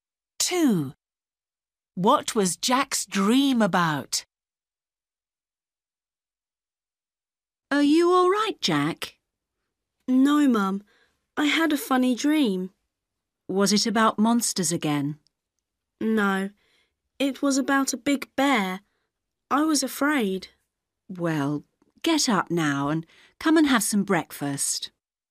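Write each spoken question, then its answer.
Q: What was Jack's dream about?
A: a big bear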